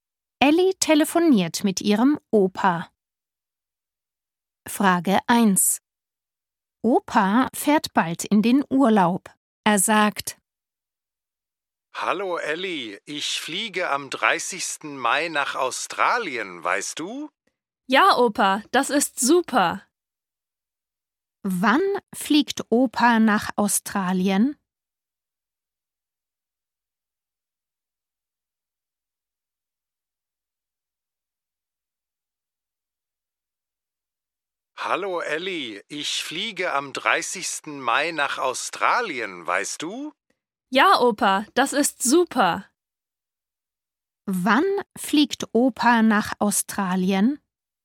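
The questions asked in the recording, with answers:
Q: Wann fliegt Opa nach Australien?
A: am 30. Mai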